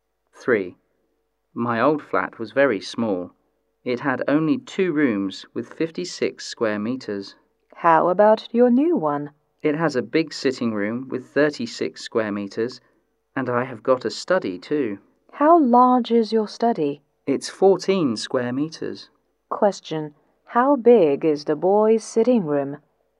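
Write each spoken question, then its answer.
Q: How big is the boy's sitting room?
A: 36 square meters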